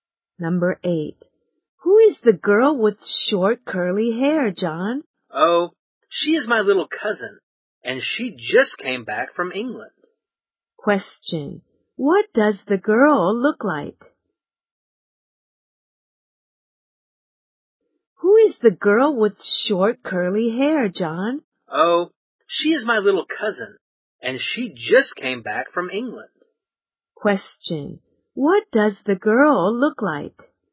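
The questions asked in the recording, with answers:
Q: What does the girl look like?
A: She has short curly hair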